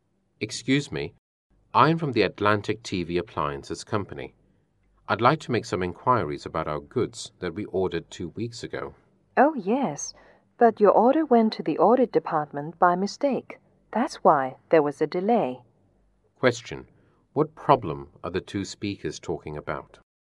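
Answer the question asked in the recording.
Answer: The delay of their order, which went to the audit department by mistake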